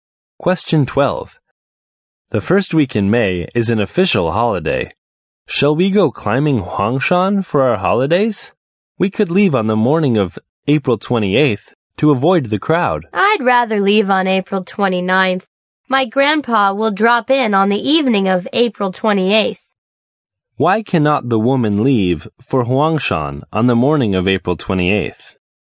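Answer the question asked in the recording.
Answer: Her grandpa will visit on the evening of April 28th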